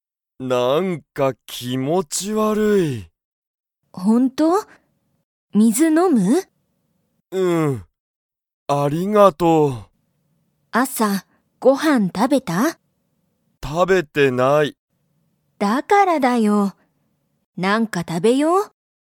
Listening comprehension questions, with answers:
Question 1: ケントは、朝あさご飯はんを食たべましたか?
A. はい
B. いいえ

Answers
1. B. いいえ

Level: Level 1

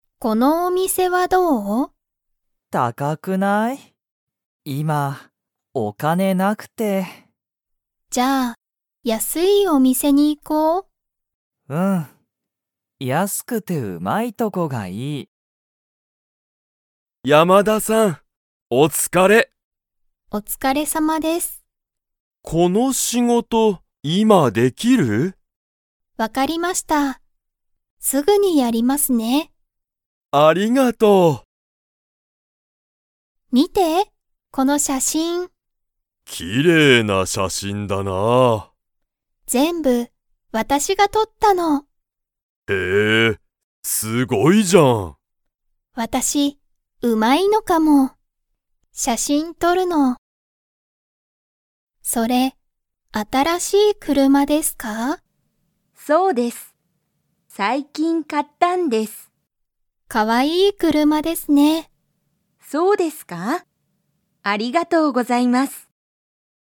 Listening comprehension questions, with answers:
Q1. ナオキは今いま、____がない。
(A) お店みせ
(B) スマホ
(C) 学校がっこう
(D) お金かね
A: (D) お金かね

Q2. 山田やまださんは、その仕事しごとをすぐにやりますか?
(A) はい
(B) いいえ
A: (A) はい

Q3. ____が、その写真しゃしんを全部撮ぜんぶとった。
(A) アミ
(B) アミの友達ともだち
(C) アミと友達ともだち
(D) アミの先生せんせい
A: (A) アミ

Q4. 松井まついさんは、最近さいきん車くるまを買かいましたか?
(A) はい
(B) いいえ(まつい)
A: (A) はい

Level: Level 1

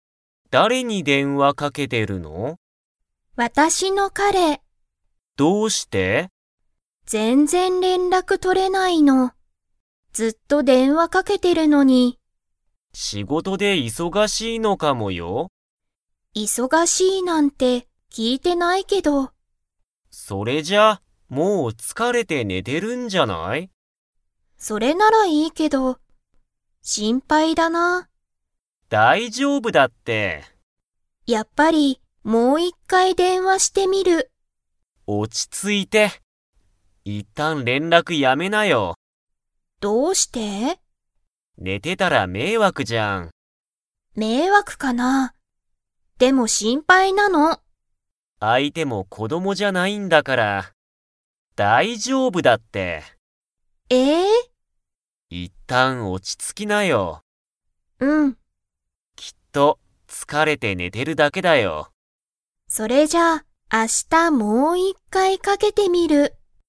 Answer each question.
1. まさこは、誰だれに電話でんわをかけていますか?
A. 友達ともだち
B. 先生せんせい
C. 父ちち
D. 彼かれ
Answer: D. 彼かれ

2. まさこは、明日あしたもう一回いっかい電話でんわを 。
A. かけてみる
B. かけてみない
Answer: A. かけてみる

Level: Level 4

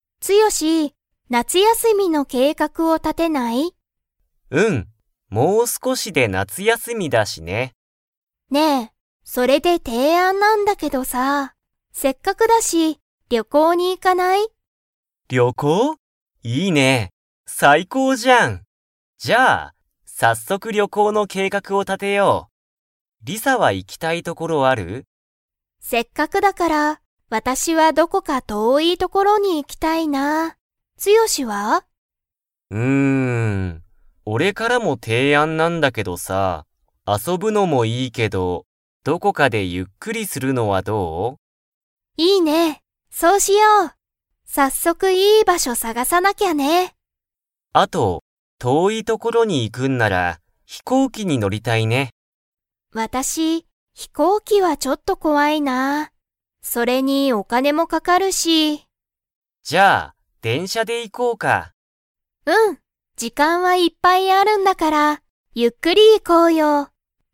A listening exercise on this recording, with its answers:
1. リサは、どこか ところに行いきたい。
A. 近ちかい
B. 遠とおい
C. 面白おもしろい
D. うるさい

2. リサは、電車でんしゃが 。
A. 怖こわい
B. 怖こわくない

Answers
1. B. 遠とおい
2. B. 怖こわくない

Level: Level 4

